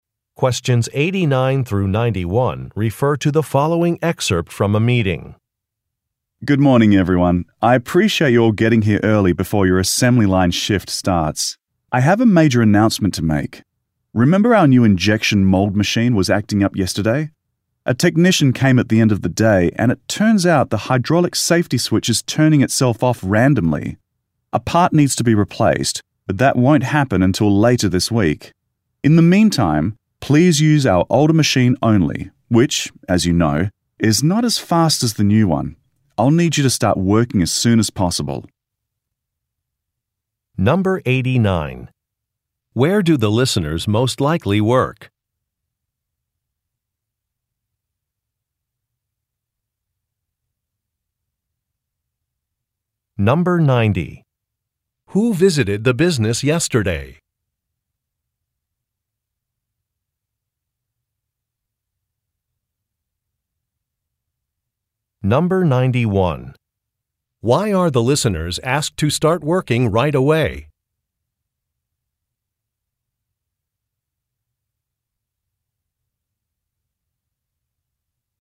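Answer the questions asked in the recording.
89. At a factory (on an assembly line)
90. A technician
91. They must use the older machine, which is slower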